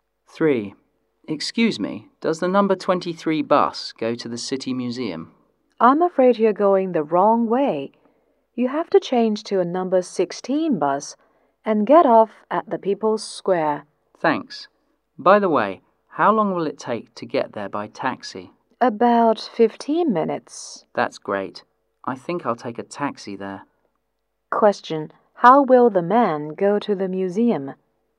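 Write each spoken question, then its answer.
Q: How will the man go to the museum?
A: By taxi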